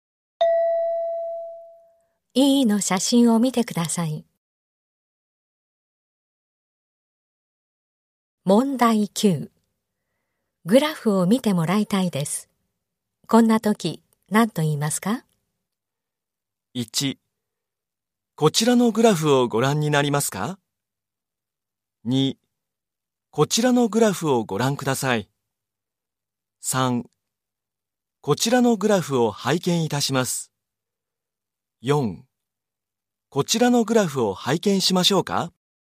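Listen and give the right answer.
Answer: 2: こちらのグラフをご覧ください。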